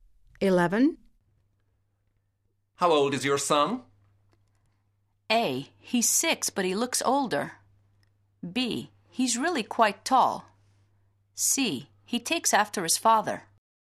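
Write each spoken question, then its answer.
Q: How old is your son?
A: A: He's 6, but he looks older.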